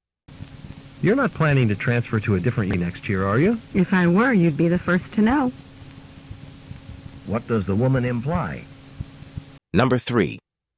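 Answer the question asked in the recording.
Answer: She is not planning to transfer.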